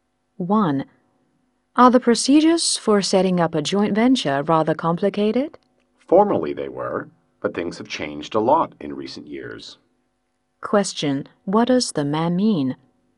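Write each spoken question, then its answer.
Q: Question: What does the man mean?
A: The procedures are no longer as complicated as before; things have changed a lot.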